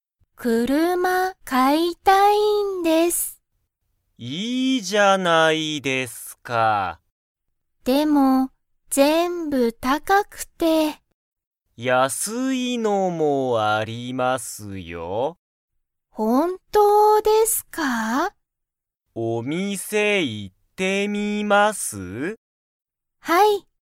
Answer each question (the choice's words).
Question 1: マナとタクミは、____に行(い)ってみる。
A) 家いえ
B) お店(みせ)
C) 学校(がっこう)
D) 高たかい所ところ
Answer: お店(みせ)

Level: Level 1